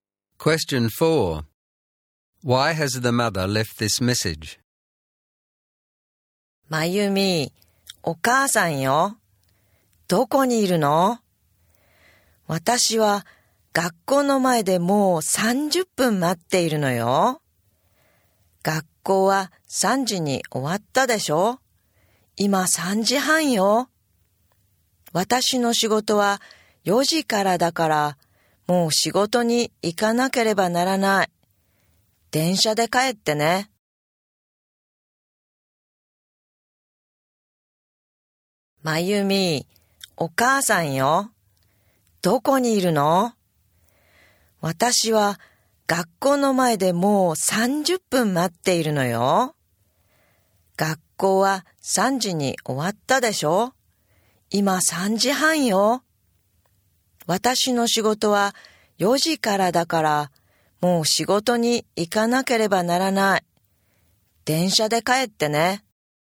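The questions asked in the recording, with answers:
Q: Why has the mother left this message?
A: She waited 30 minutes at the school and has to leave for work at 4, so Mayumi must go home by train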